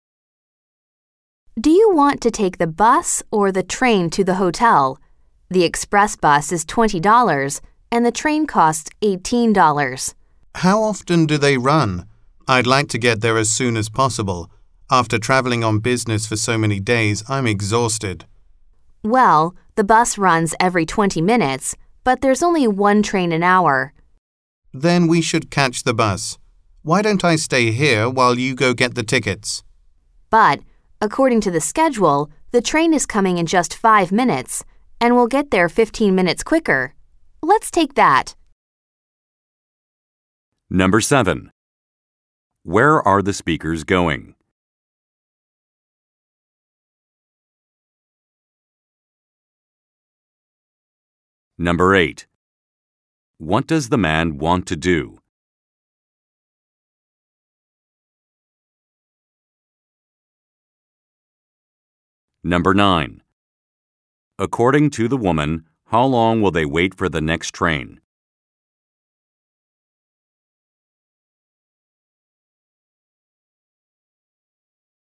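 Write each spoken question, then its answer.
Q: Where are the speakers going?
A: To the hotel

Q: According to the woman, how long will they wait for the next train?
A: 5 minutes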